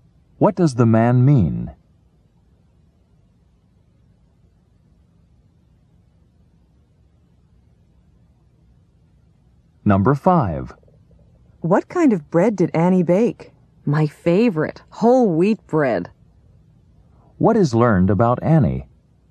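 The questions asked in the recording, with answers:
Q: What is learned about Annie?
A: She baked whole wheat bread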